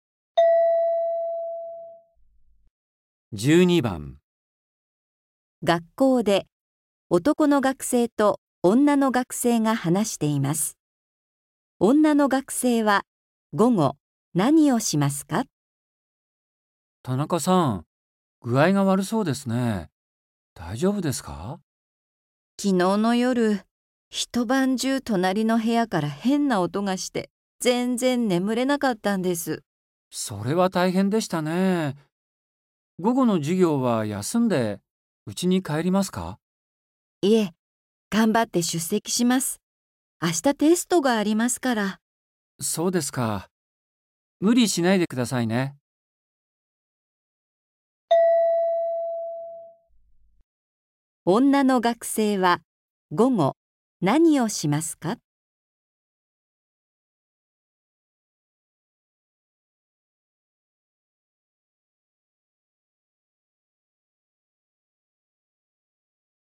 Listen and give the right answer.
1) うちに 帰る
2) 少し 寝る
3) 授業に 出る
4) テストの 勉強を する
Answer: 3) 授業に 出る

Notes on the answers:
F:いえ、がんばって出席します。明日テストがありますから。

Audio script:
F:いえ、がんばって出席します。明日テストがありますから。
M:そうですか。無理しないでくださいね。
女の学生は、午後、何をしますか。

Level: 初級